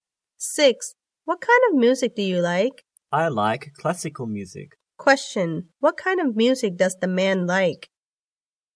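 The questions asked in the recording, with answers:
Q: What kind of music does the man like?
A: Classical music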